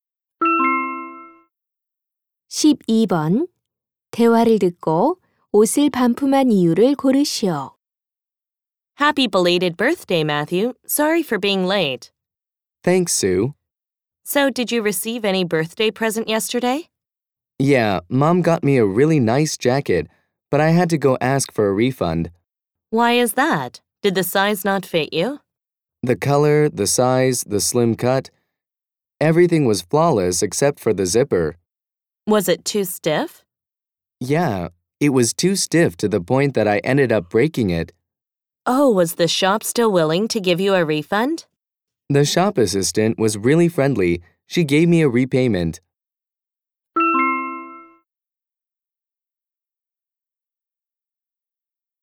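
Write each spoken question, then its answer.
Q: 대화를 듣고 옷을 반품한 이유를 고르시오.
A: 지퍼가 너무 뻑뻑해서 고장 나서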